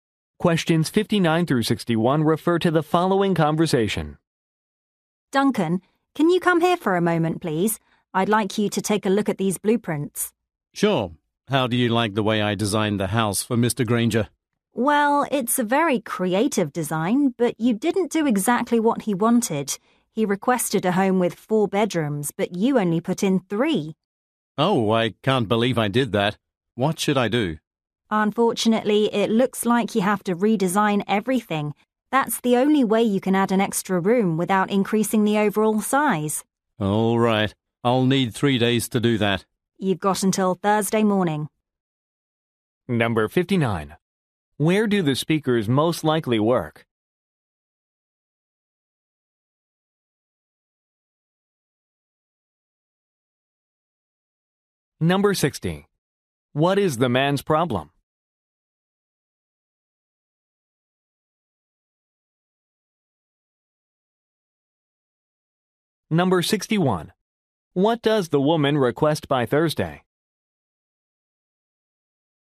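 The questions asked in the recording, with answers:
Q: Where do the speakers most likely work?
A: At an architecture firm

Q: What is the man's problem?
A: He designed 3 bedrooms instead of 4

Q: What does the woman request by Thursday?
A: A redesign of the house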